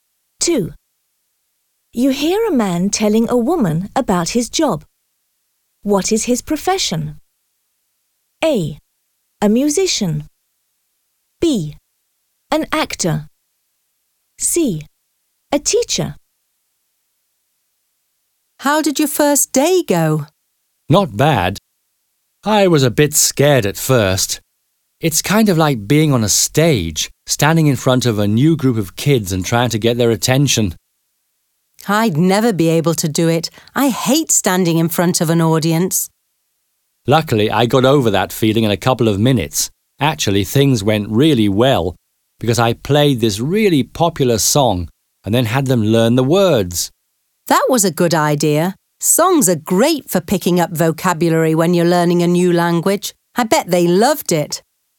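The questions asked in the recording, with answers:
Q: What is his profession?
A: C: A teacher.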